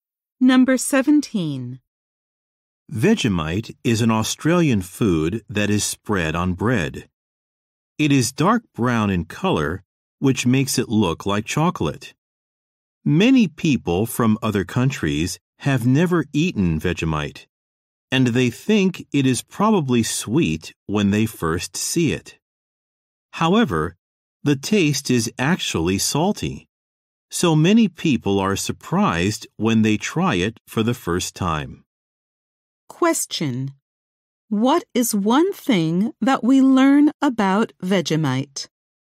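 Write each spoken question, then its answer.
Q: What is one thing that we learn about Vegemite?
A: It looks like chocolate but tastes salty.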